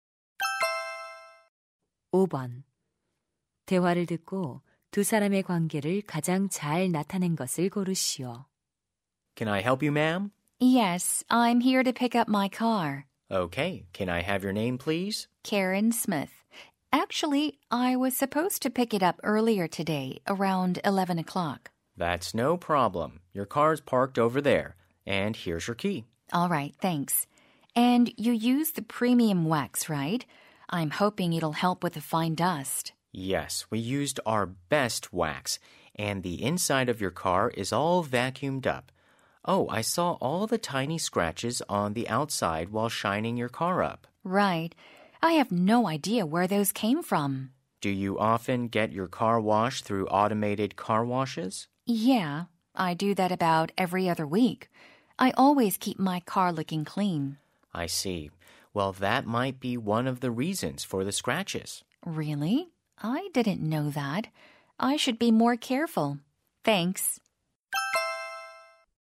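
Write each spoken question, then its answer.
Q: 대화를 듣고 두 사람의 관계를 가장 잘 나타낸 것을 고르시오.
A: 세차장 직원 - 고객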